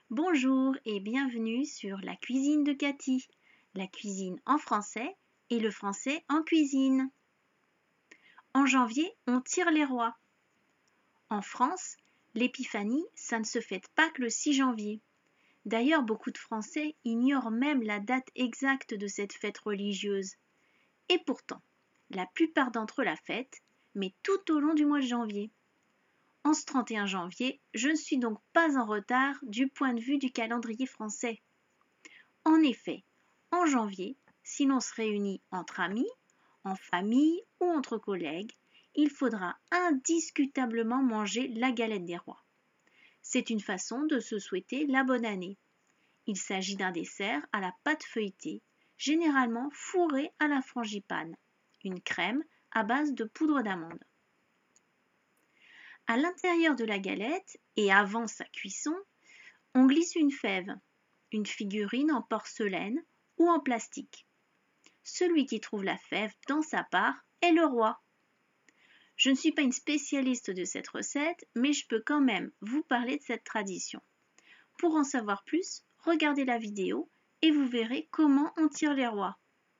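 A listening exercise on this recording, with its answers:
Ecoute cet enregistrement et réponds aux questions suivantes par vrai ou faux.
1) En France, l'épiphanie se fête uniquement le 6 janvier.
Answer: Faux

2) La tradition veut que l'on mange la galette des rois pour se souhaiter la bonne année.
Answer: Vrai

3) La galette des rois est un dessert fait à base d'amande.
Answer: Vrai

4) Celui qui trouve le haricot dans sa part devient le roi ou la reine.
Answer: Faux

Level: A2 – intermédiaire moyen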